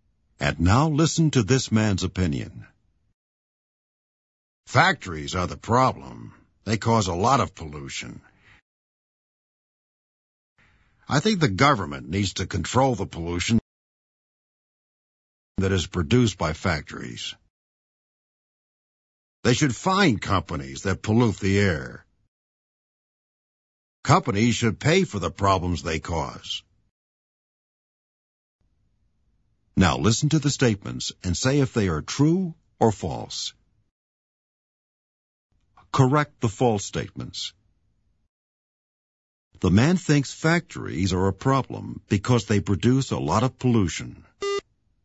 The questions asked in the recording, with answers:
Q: The man thinks factories are a problem because they produce a lot of pollution.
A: True.